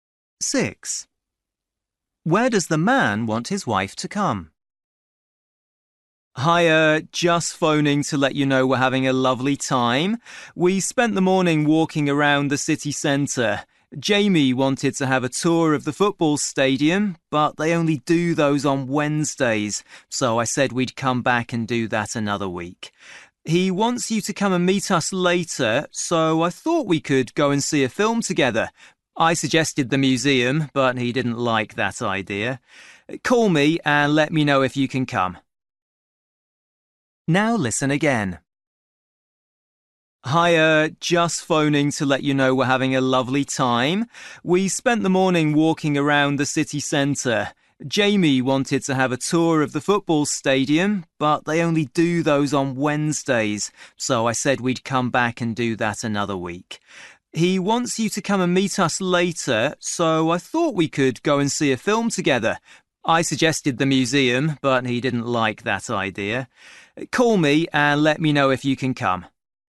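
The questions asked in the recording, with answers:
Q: Where does the man want his wife to come?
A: To the cinema to see a film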